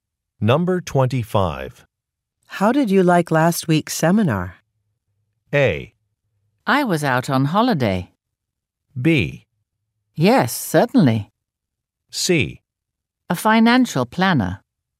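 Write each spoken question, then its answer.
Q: How did you like last week's seminar?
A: A: I was out on holiday.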